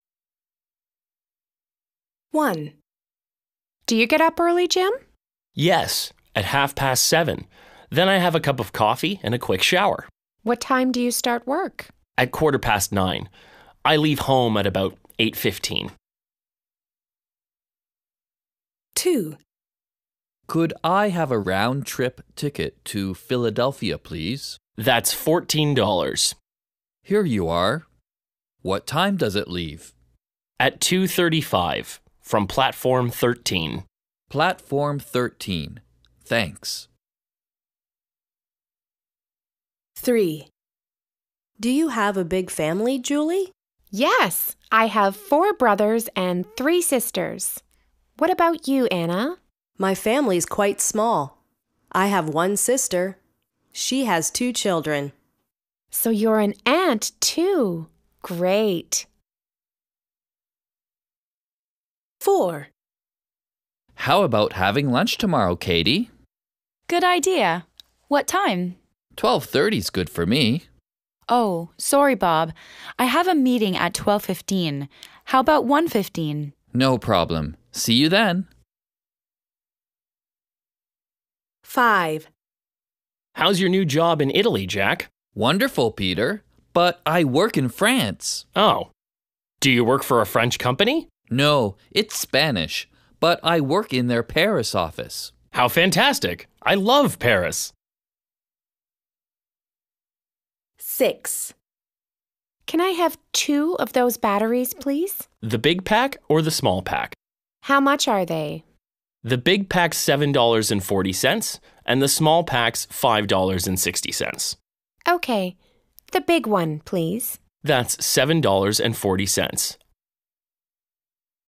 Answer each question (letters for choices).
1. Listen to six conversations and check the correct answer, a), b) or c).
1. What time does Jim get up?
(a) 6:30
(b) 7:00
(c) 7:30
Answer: c

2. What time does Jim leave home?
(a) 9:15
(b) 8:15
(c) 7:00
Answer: b

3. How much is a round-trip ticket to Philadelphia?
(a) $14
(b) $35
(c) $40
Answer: a

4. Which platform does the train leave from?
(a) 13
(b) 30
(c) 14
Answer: a

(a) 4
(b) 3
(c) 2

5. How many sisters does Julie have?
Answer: b

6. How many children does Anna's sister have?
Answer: c

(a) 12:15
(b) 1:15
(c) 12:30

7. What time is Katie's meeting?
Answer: a

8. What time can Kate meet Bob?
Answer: b

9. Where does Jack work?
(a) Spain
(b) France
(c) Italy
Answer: b

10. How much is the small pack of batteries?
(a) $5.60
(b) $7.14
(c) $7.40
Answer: a